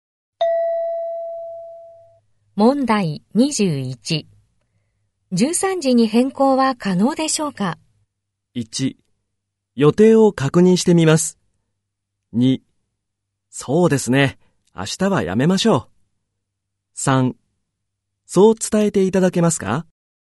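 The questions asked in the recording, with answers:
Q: 13時に変更は可能でしょうか?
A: 1: 予定を確認してみます。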